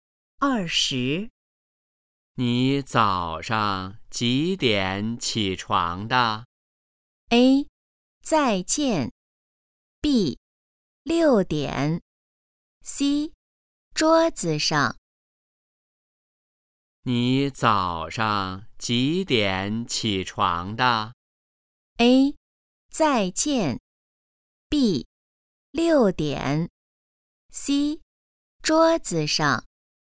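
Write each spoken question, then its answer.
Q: 你早上几点起床的?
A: B: 六点。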